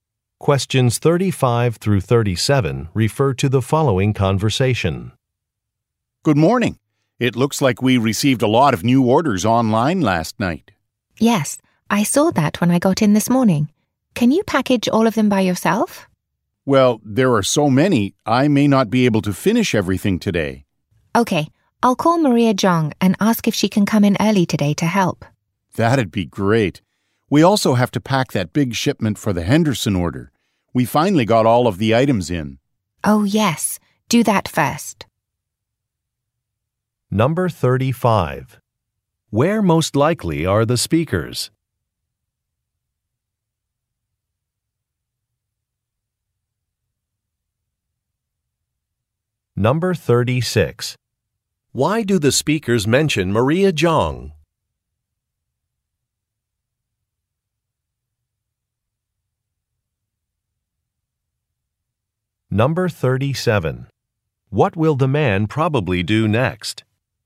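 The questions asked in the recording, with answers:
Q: Where most likely are the speakers?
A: At a company that ships online orders (a warehouse)

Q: Why do the speakers mention Maria Zhang?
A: She may come in early to help package orders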